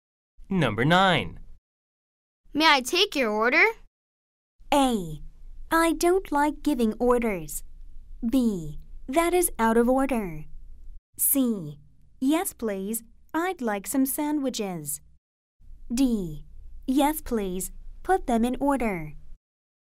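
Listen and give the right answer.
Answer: C: Yes, please. I'd like some sandwiches.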